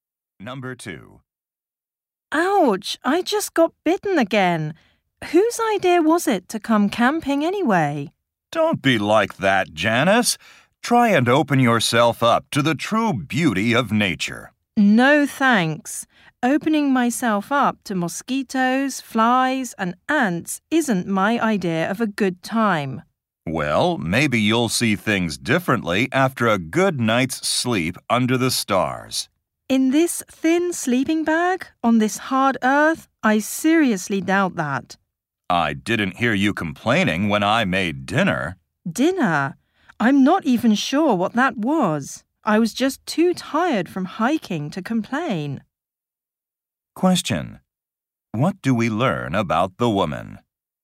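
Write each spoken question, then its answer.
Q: What do we learn about the woman?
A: She is not enjoying the camping trip.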